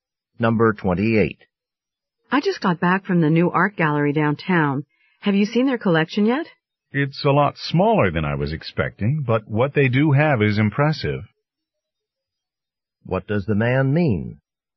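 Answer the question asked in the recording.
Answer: The collection is small but impressive.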